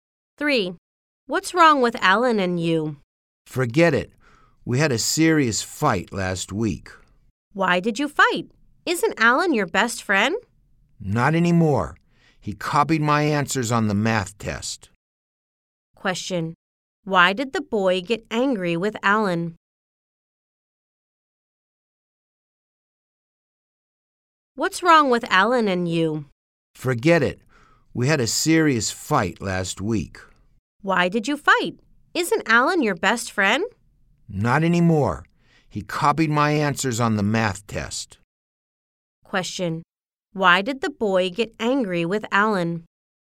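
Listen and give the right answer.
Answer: Alan copied his answers on the math test.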